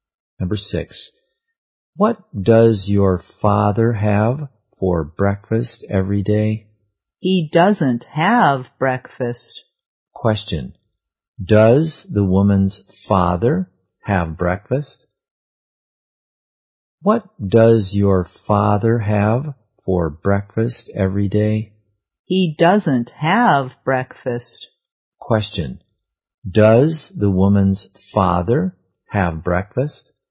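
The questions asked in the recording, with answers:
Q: does the woman's father have breakfast?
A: No, he doesn't.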